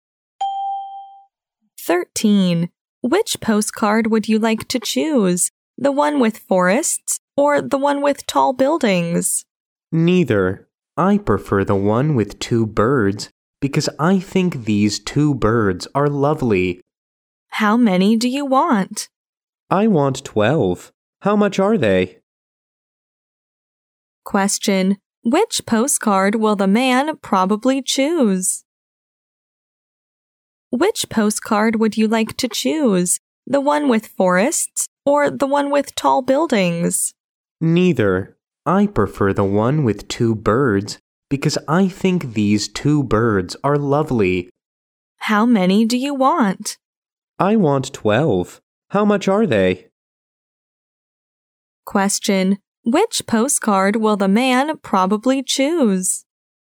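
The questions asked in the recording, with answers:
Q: which postcard will the man probably choose?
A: The one with two birds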